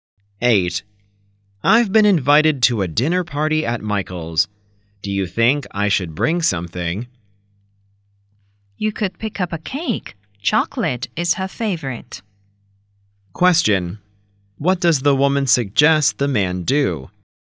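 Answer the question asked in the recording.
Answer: Bring a chocolate cake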